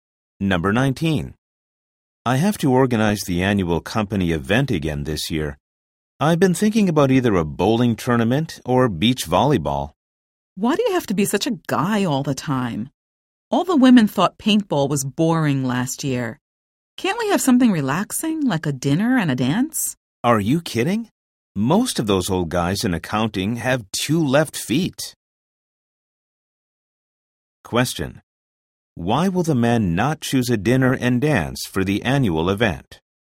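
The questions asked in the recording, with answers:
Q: Why will the men not choose a dinner and dance for the annual event?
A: Many older men in accounting can't dance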